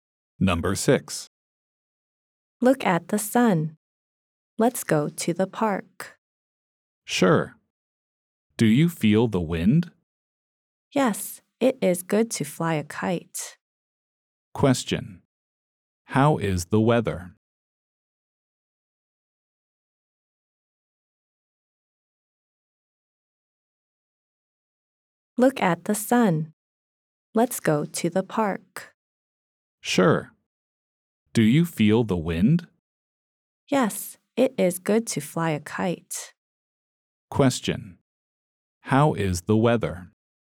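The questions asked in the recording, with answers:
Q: How is the weather?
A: It is sunny and windy.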